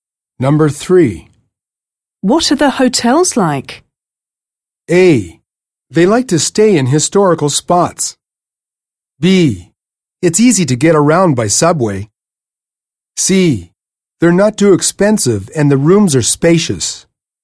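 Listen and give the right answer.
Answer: C: They're not too expensive and the rooms are spacious.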